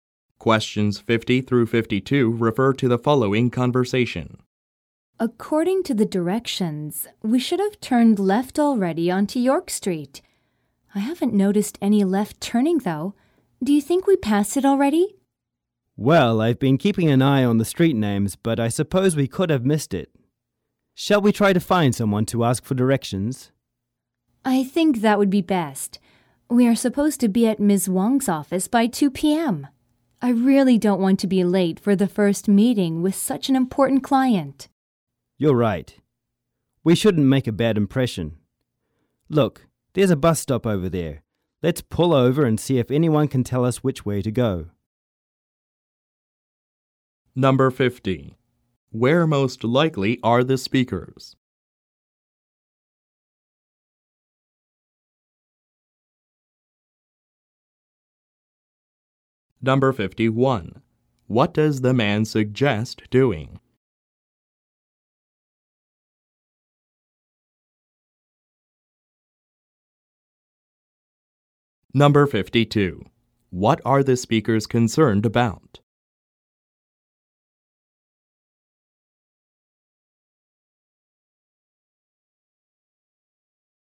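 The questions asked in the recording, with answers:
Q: Where most likely are the speakers?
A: In a car

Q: What are the speakers concerned about?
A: Being late for a meeting with an important client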